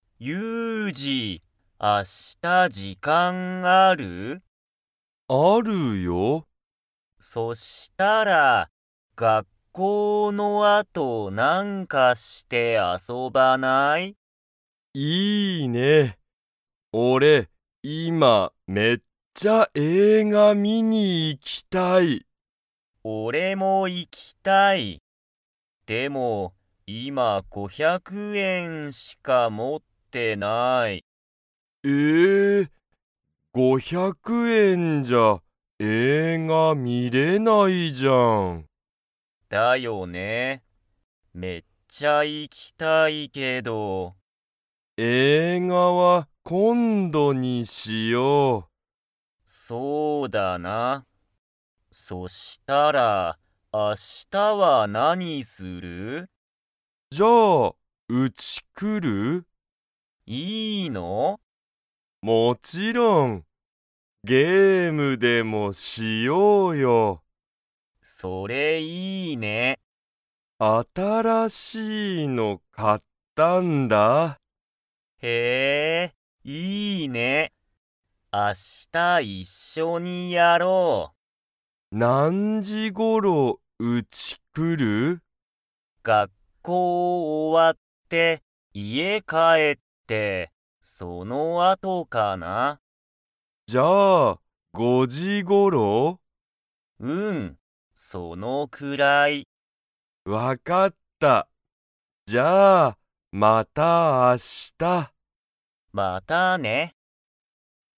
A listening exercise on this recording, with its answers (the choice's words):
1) しゅうとゆうじは、明日(あした)、映画(えいが)を観(み)に行(い)きますか?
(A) はい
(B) いいえ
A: いいえ

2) ゆうじは、新(あたら)しい____を買(か)った。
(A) 映画(えいが)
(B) ゲーム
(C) お金(かね)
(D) 学校(がっこう)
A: ゲーム

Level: Level 2